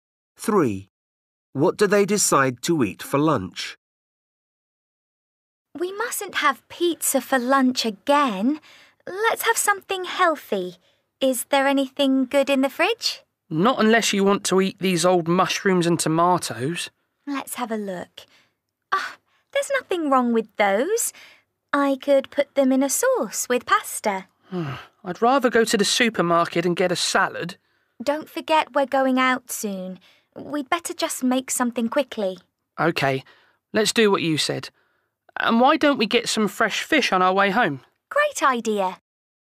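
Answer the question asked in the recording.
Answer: pasta with a mushroom and tomato sauce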